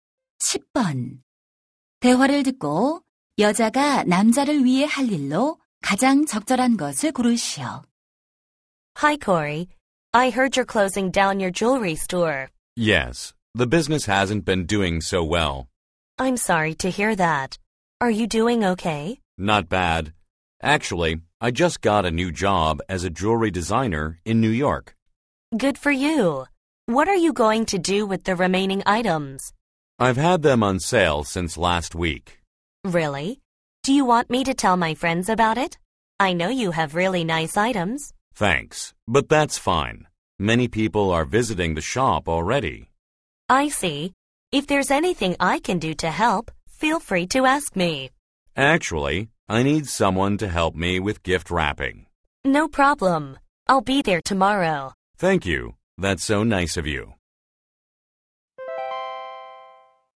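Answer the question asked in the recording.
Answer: 선물 포장 돕기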